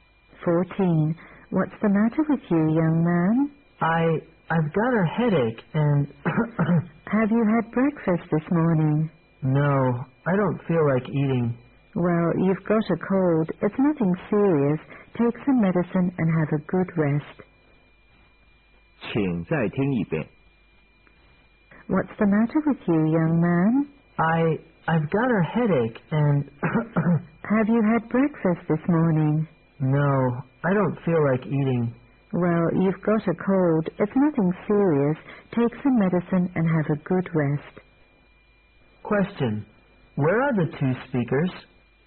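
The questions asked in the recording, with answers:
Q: Where are the two speakers?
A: In a hospital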